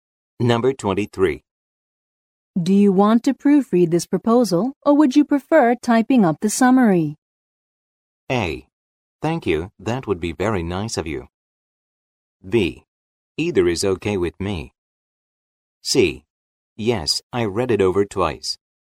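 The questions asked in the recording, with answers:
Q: Do you want to proofread this proposal, or would you prefer typing up the summary?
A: B: Either is okay with me.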